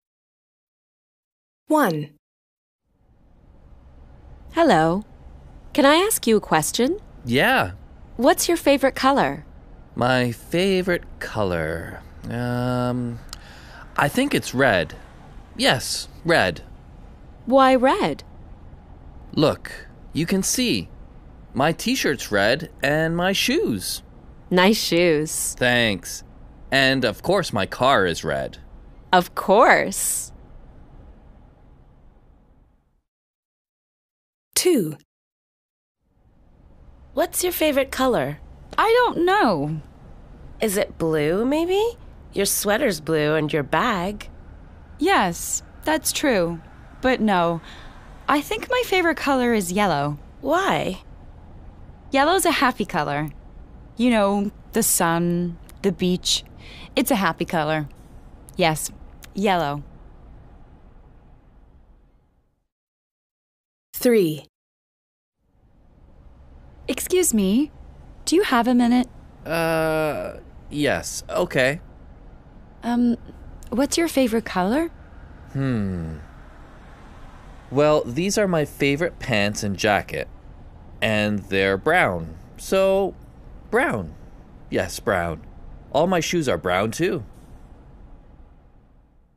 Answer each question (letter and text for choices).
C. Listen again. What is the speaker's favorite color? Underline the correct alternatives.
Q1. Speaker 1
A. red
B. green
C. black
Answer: A. red

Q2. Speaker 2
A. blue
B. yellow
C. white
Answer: B. yellow

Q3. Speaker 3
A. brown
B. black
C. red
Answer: A. brown